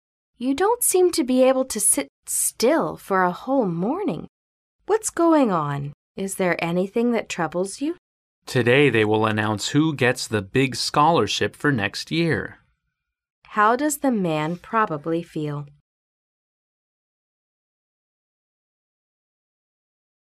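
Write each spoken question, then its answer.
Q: How does the man probably feel?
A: Nervous.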